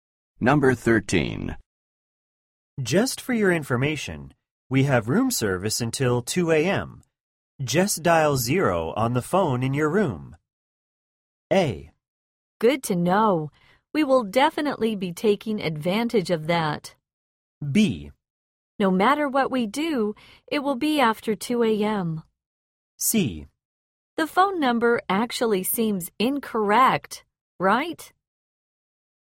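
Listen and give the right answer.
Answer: A: Good to know. We will definitely be taking advantage of that.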